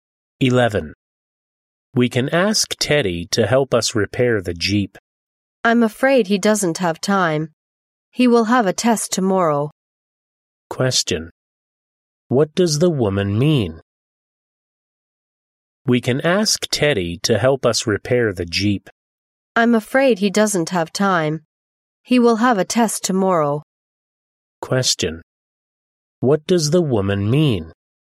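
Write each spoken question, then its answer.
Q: What does the woman mean?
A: Teddy has no time to help because he has a test tomorrow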